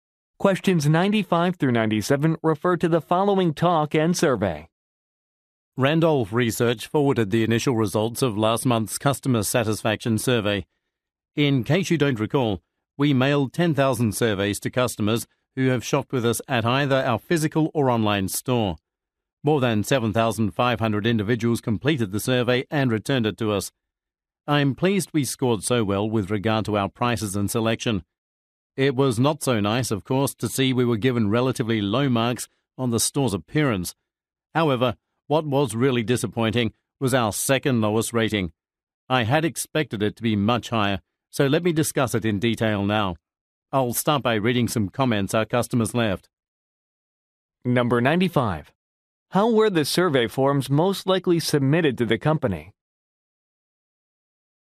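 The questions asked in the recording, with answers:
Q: How were the survey forms most likely submitted to the company?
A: By mail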